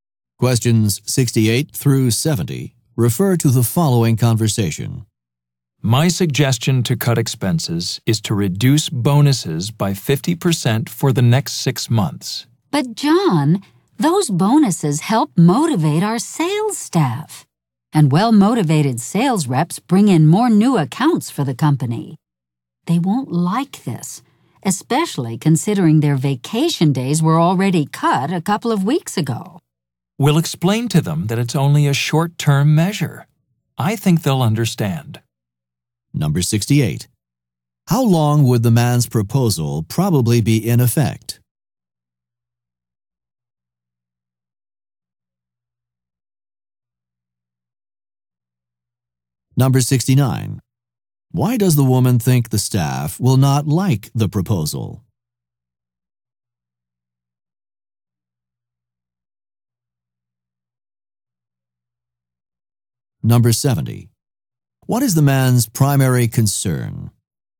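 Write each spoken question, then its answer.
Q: How long would the man's proposal probably be in effect?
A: Six months

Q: Why does the woman think the staff will not like the proposal?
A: Their vacation days were already cut

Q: What is the man's primary concern?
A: Cutting expenses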